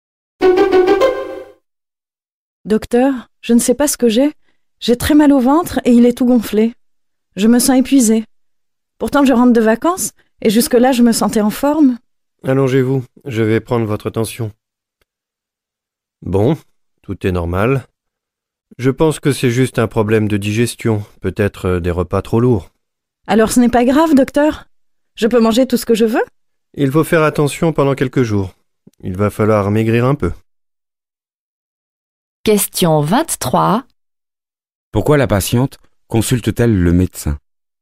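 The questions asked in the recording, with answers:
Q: Pourquoi la patiente consulte-t-elle le médecin?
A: Elle a mal au ventre et se sent épuisée.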